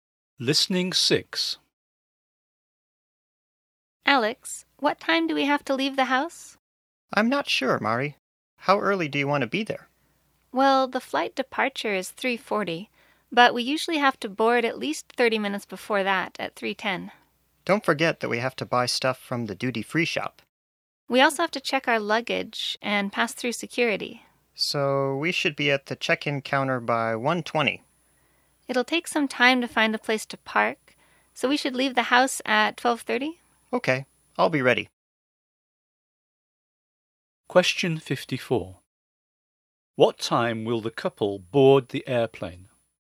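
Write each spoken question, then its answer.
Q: What time will the couple board the airplane?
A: 3:10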